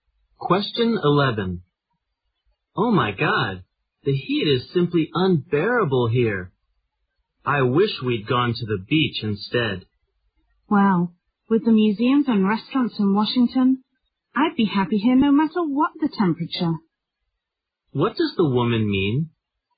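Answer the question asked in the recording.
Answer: She enjoys Washington despite the heat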